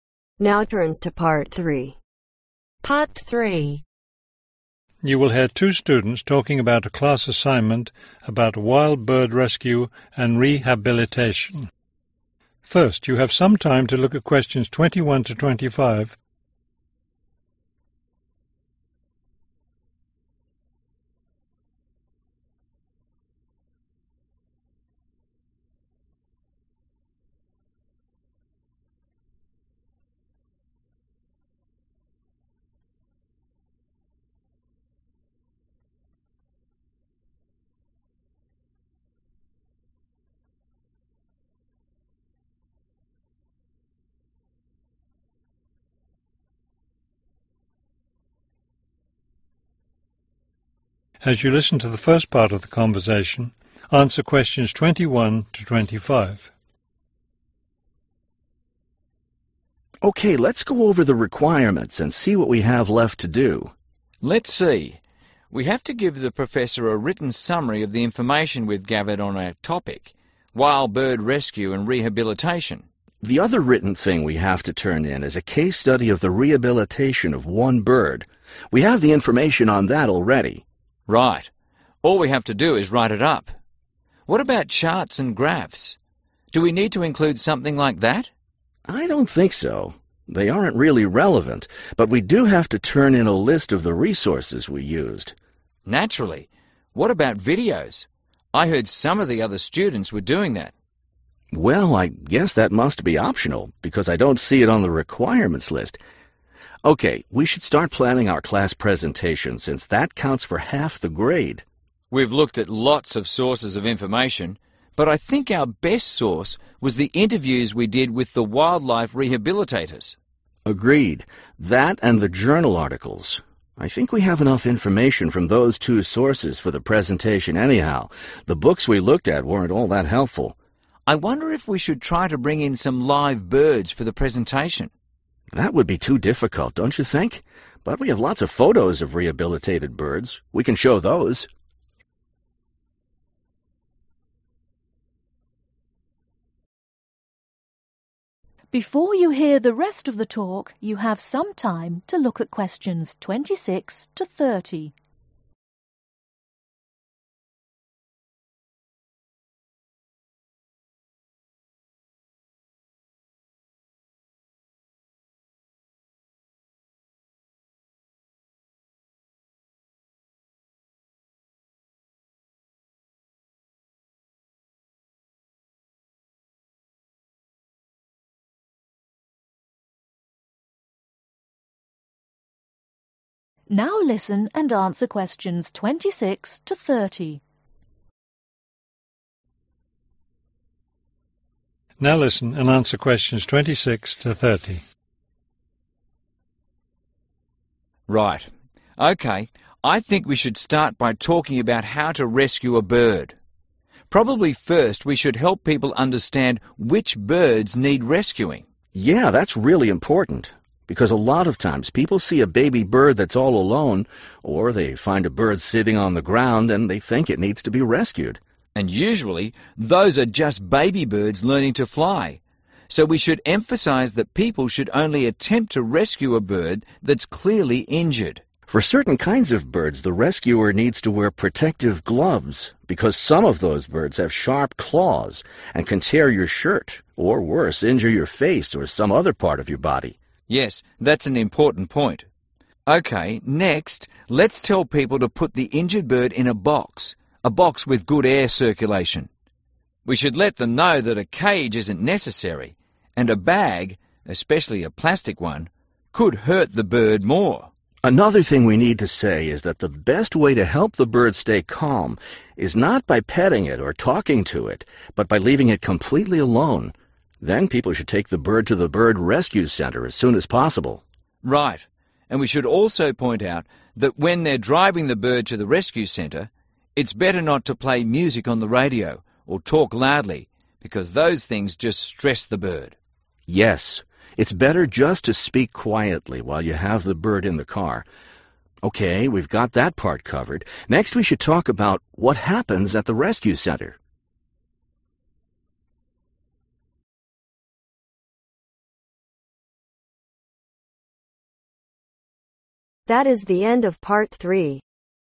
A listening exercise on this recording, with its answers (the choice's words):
Choose THREE letters A-F.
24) What two sources of information will the students use when preparing their presentation ?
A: Interviews, Journal Articles

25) What will the students show during their presentation ?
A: Photos (of Birds)

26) Only rescue birds that are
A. all alone.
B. obviously hurt.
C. sitting on the ground.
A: obviously hurt.

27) Protect yourself by wearing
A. gloves.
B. a hat.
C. protective glasses.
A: gloves.

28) Put the bird in a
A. cage.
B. box.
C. bag.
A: box.

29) Keep the bird calm by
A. petting it.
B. talking to it.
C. leaving it alone.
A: leaving it alone.

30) When transporting the bird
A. speak quietly.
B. play music.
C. drive very slowly.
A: speak quietly.